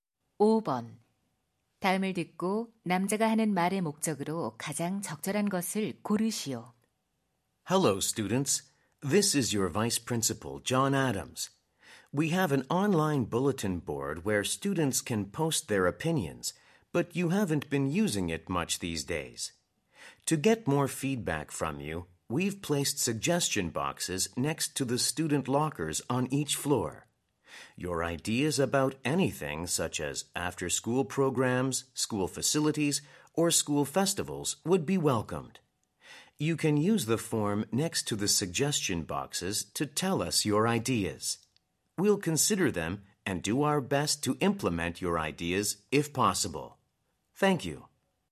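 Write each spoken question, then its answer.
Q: 다음을 듣고 남자가 하는 말의 목적으로 가장 적절한 것을 고르시오.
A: 학생 건의함 설치를 안내하고 의견 제출을 독려하려고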